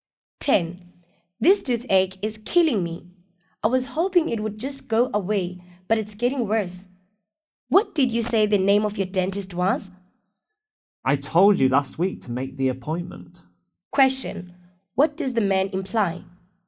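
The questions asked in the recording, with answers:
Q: What does the man imply?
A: The woman should have made a dentist appointment earlier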